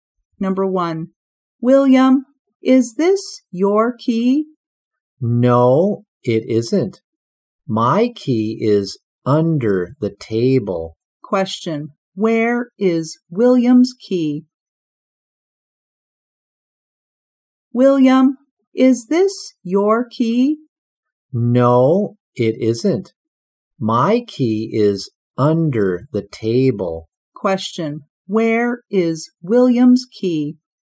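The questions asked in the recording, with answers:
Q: Question, where is William's key?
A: Under the table.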